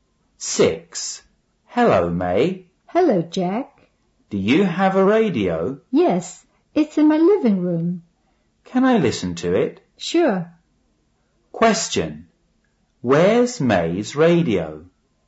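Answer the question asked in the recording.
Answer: In her living room.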